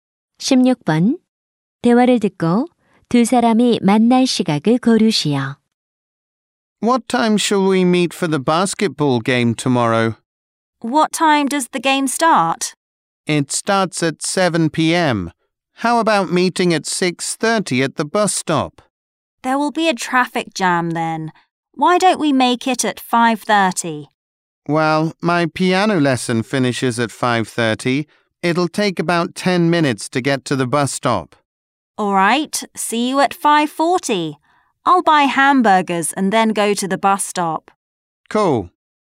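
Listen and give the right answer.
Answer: 5시 40분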